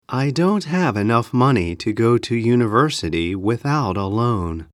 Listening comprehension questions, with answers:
英文の音声を1度だけ聞いて,空所のことばを記入しなさい。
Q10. I don't have ( ) money ( ) go to university ( ) a loan.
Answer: enough, to, without